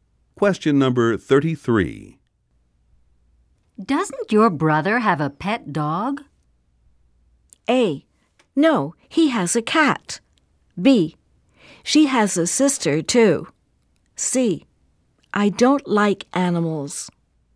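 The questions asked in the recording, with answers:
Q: Doesn't your brother have a pet dog?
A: A: No, he has a cat.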